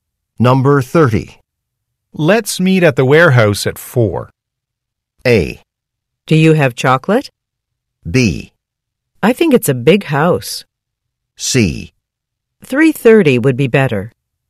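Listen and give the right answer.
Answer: C: 3:30 would be better.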